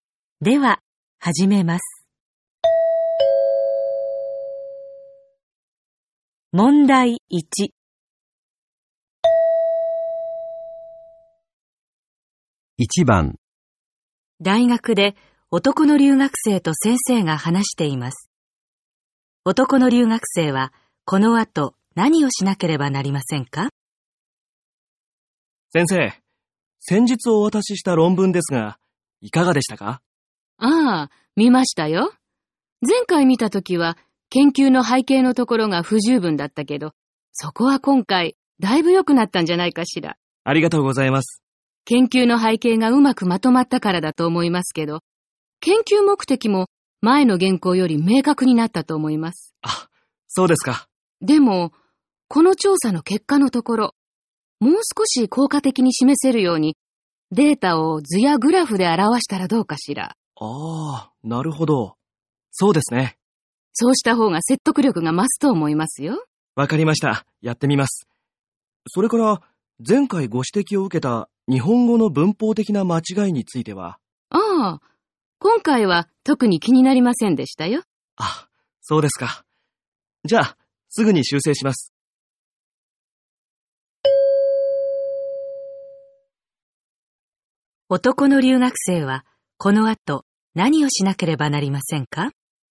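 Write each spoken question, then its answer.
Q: 男の留学生はこの後何をしなければなりませんか?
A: 調査結果のデータを図やグラフで表す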